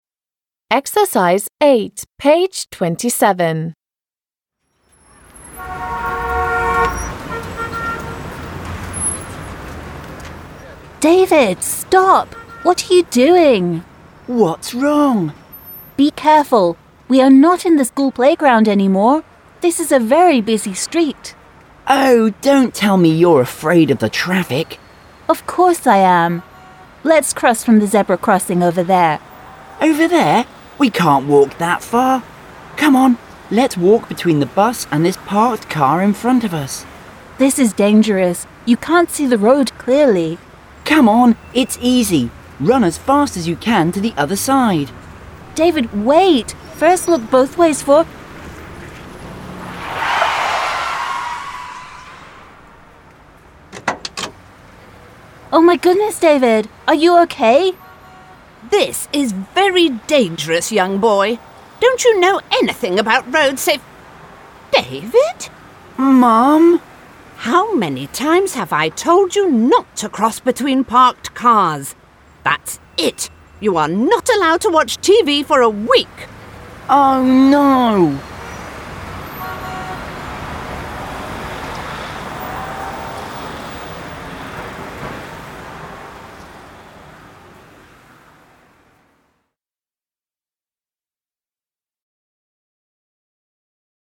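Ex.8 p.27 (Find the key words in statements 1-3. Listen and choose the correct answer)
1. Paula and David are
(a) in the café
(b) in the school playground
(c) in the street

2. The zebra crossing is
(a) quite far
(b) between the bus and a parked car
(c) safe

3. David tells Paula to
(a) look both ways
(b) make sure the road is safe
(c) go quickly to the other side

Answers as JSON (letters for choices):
{"1": "c", "2": "a", "3": "c"}

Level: 6 класс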